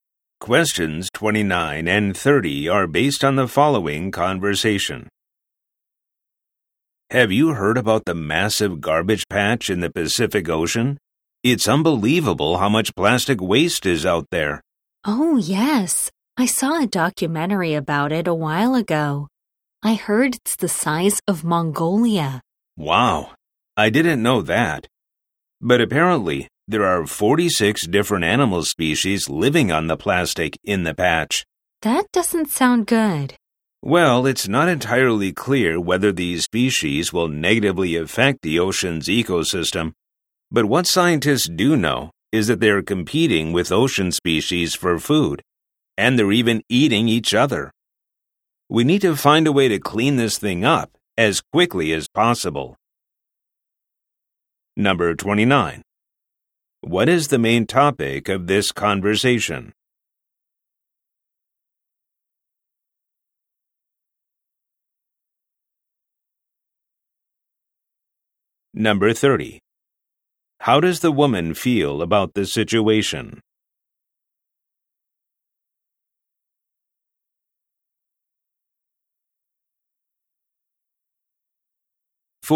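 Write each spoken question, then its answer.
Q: What is the main topic of this conversation?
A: The garbage patch in the Pacific Ocean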